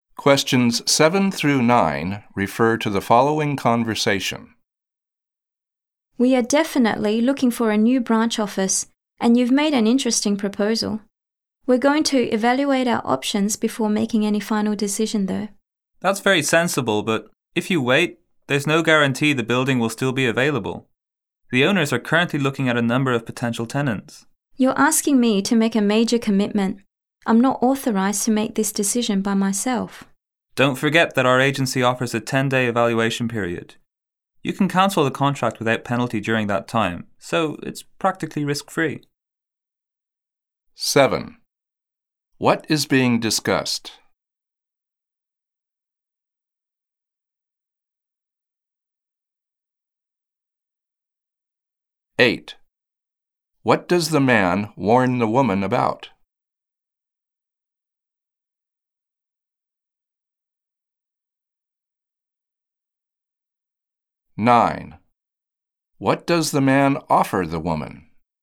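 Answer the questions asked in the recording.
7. Renting a building for a new branch office
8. The building may not still be available if she waits
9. A 10-day evaluation period to cancel without penalty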